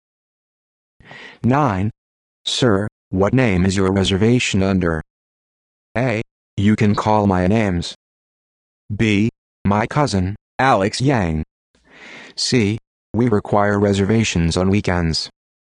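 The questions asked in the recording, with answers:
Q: Sir, what name is your reservation under?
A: B: My cousin, Alex Yang.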